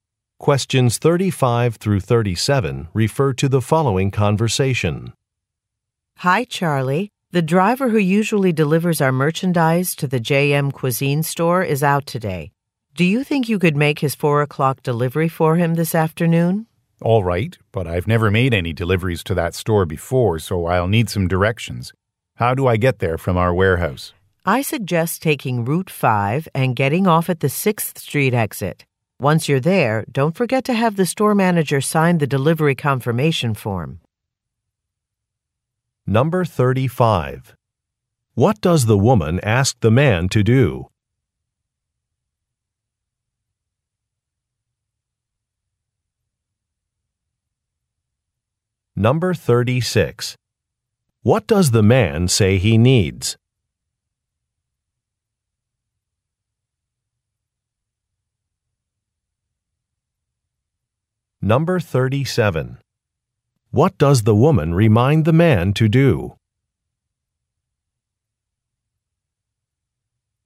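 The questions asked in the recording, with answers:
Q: What does the woman ask the man to do?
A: Make a delivery for another driver

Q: What does the man say he needs?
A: Directions to the store

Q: What does the woman remind the man to do?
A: Have the store manager sign the delivery confirmation form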